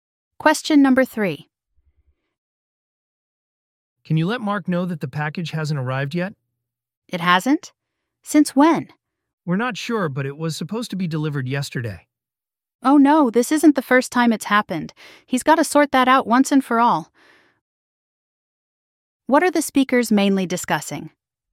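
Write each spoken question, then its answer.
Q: What are the speakers mainly discussing?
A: A package that hasn't arrived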